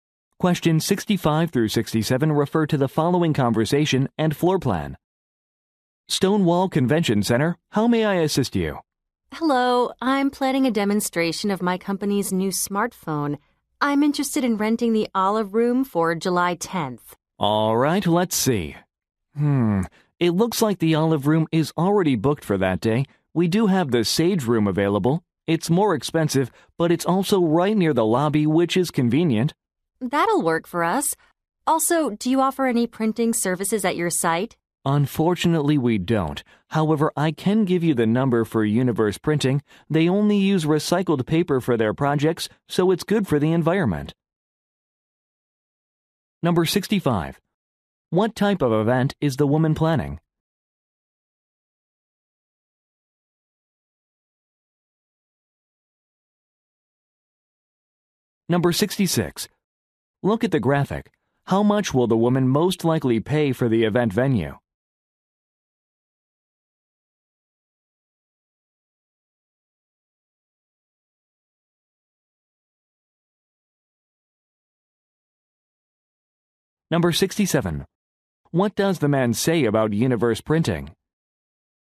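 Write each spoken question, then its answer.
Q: What type of event is the woman planning?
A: A product demonstration of a new smartphone

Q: What does the man say about universe printing?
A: It uses only recycled paper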